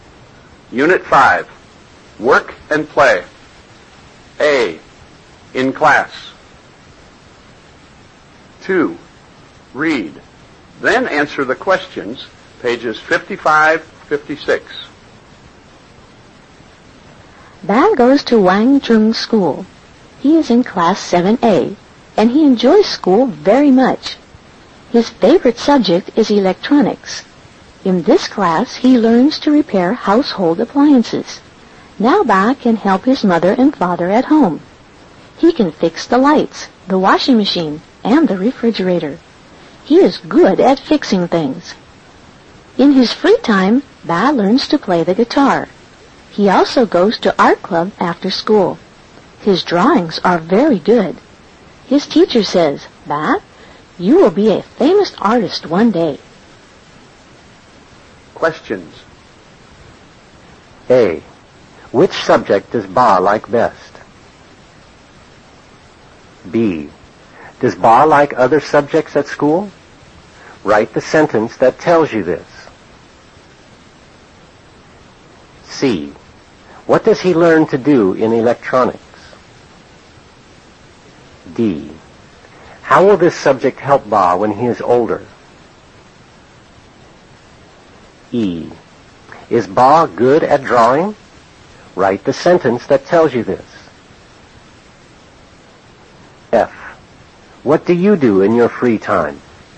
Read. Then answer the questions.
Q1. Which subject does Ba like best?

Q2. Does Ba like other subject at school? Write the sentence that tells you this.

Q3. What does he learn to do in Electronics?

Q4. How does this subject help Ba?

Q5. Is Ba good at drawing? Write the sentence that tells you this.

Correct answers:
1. Ba likes electronics best.
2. Yes, he does. He likes music and art. He usually goes to the art club after school and he learns to play the guitar in his free time.
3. He learns to repair household appliances in electronics.
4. This subject helps him to repair and fix household appliances such as fixing lights, the washing machine and the refrigerator.
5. Yes, he is. His drawings are very good and his teacher says 'Ba, you'll be a famous artist one day'.

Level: Lớp 7